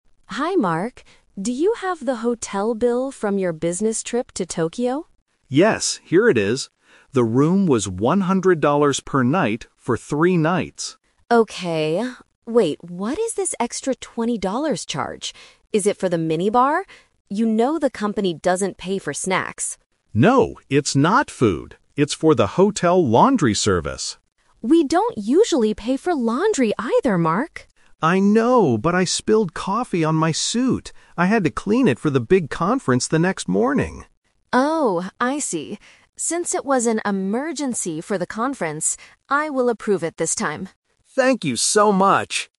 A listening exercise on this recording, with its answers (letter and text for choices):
Listen to a conversation between an accountant and a salesperson. Choose the correct answer (A, B, or C) for each question.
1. What was the $20 extra charge for?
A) Snacks from the minibar.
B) The hotel laundry service.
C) A new suit for the conference.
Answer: B) The hotel laundry service.

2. Why did Mark need to use this service?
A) He spilled coffee on his suit.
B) He forgot to bring clean clothes.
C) He wanted to look nice for a party.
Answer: A) He spilled coffee on his suit.

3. What does Sarah decide to do? (The Twist)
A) She refuses to pay the extra charge.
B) She makes Mark pay for his hotel room.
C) She agrees to pay the extra charge.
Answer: C) She agrees to pay the extra charge.

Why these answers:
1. Mark clearly says, "It's for the hotel laundry service." Trap: Option A is a trap because Sarah asks if it is for the "minibar" (snacks), but Mark says no. Option C is a trap using the word "suit", but he didn't buy a new one; he just cleaned his old one.
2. Mark explains his problem: "I spilled coffee on my suit." Trap: Option B is a plausible reason for using laundry services, but it is not mentioned. Option C is a trap because he needed the suit for a "conference", not a party.
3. This is the Twist. Normally, the company doesn't pay for laundry ("We don't usually pay for laundry either"). But because it was an emergency, she changes the rule and says, "I will approve it this time." Trap: Option A is what Sarah usually does (company policy), but not what she does in this specific situation. Option B is incorrect because the company is definitely paying for the room, they were only arguing about the $20 extra charge.

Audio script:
Sarah: Hi Mark. Do you have the hotel bill from your business trip to Tokyo?
Mark: Yes, here it is. The room was $100 per night for three nights.
Sarah: Okay... wait, what is this extra $20 charge? Is it for the minibar? You know the company doesn't pay for snacks.
Mark: No, it's not food. It's for the hotel laundry service.
Sarah: We don't usually pay for laundry either, Mark.
Mark: I know, but I spilled coffee on my suit. I had to clean it for the big conference the next morning!
Sarah: Oh, I see. Since it was an emergency for the conference, I will approve it this time.
Mark: Thank you so much!